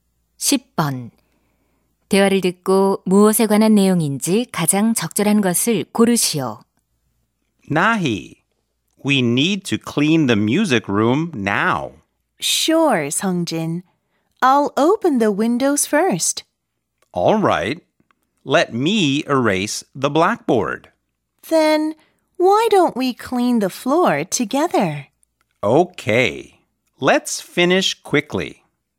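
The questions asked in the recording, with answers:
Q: 대화를 듣고 무엇에 관한 내용인지 가장 적절한 것을 고르시오.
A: 음악실 청소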